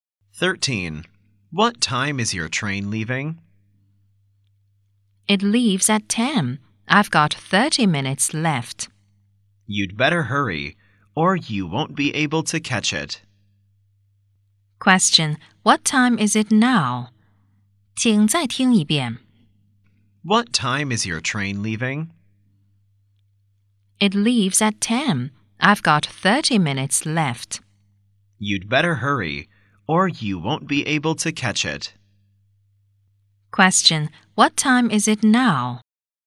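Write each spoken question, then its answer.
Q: What time is it now?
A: 9:30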